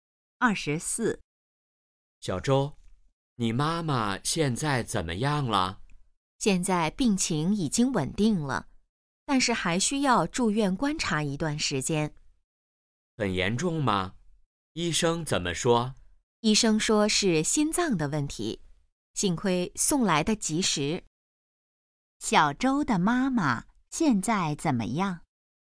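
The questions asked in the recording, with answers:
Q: 小周的妈妈现在怎么样?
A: 病情稳定了,但还需住院观察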